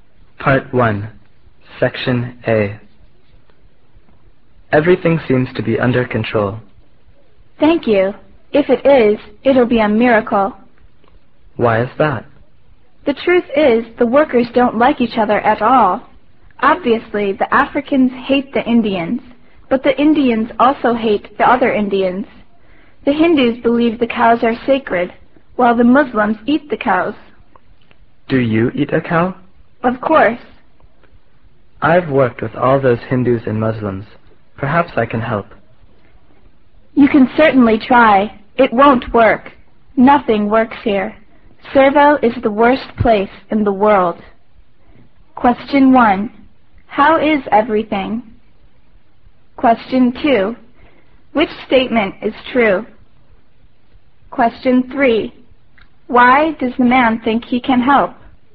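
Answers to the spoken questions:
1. Everything seems to be under control.
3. He has worked with Hindus and Muslims before.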